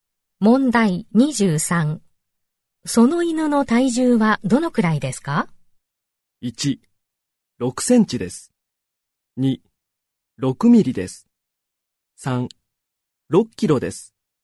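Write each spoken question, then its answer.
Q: その犬の体重はどのくらいですか?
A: 3: 6キロです。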